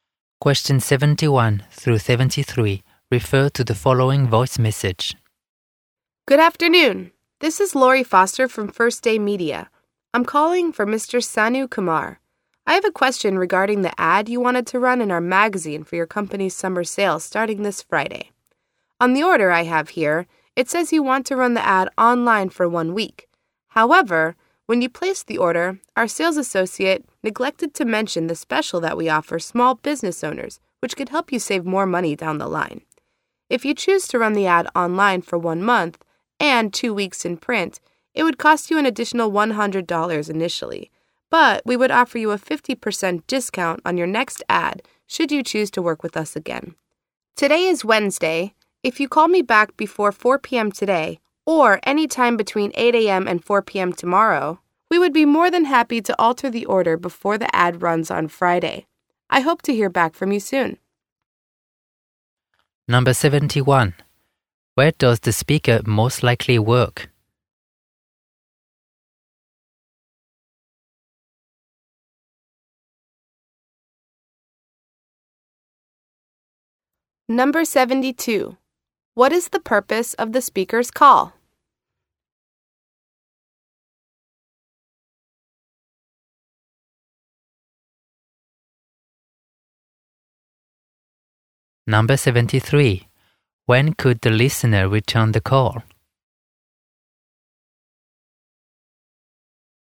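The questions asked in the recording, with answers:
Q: Where does the speaker most likely work?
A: At a media company that publishes a magazine

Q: What is the purpose of the speaker's call?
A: To offer a special deal and change the ad order

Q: When could the listener return the call?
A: Before 4 p.m. today or 8 a.m.–4 p.m. tomorrow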